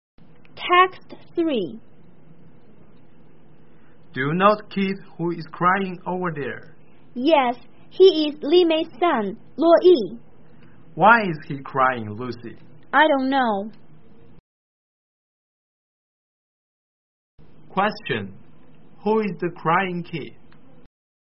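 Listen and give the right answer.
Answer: Li Mei's son, Luo Yi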